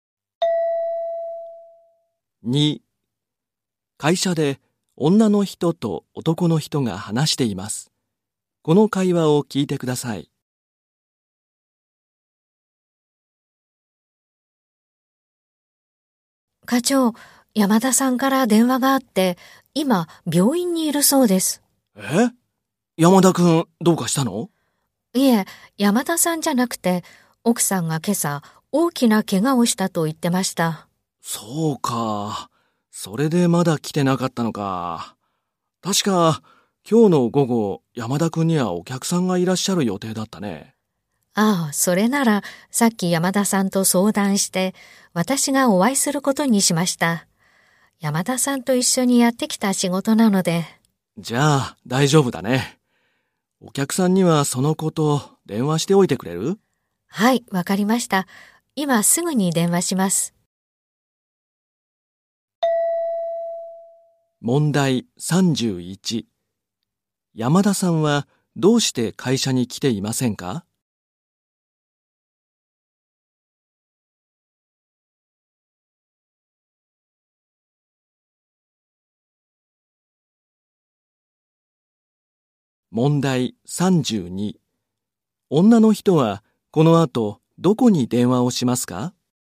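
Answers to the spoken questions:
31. 奥さんが大きな怪我をしたから
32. お客さん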